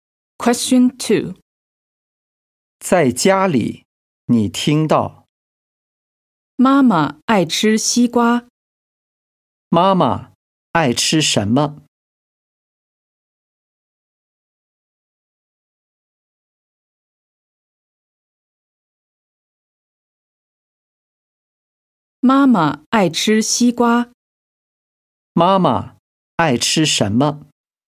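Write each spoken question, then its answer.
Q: 妈妈爱吃什么?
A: 西瓜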